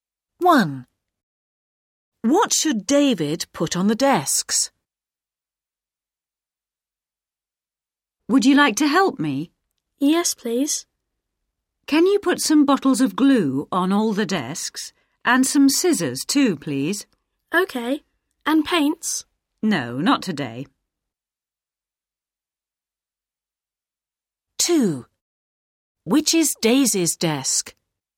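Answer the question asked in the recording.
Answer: bottles of glue and scissors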